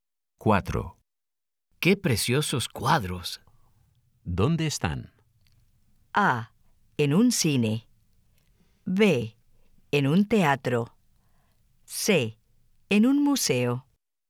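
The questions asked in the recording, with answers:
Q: ¿Dónde están?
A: C: En un museo.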